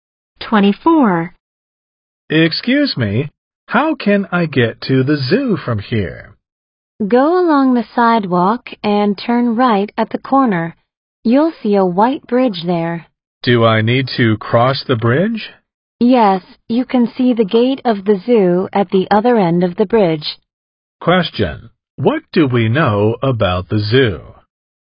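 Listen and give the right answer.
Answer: It is at the other end of the white bridge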